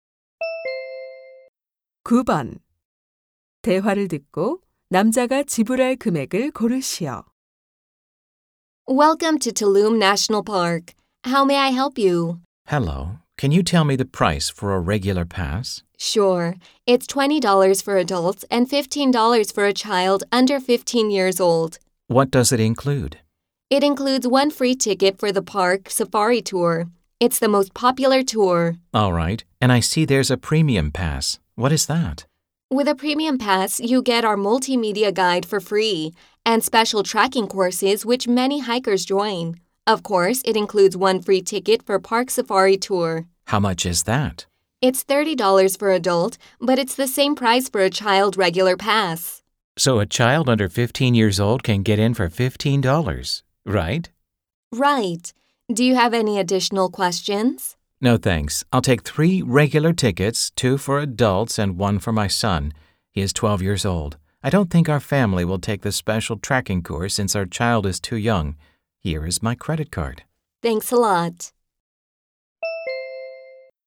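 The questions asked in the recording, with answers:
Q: 대화를 듣고 남자가 지불할 금액을 고르시오.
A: $55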